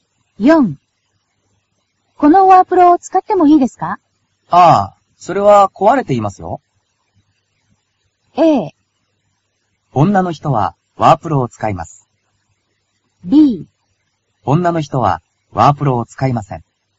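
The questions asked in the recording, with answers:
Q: このワープロを使ってもいいですか?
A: B: 女の人はワープロを使いません。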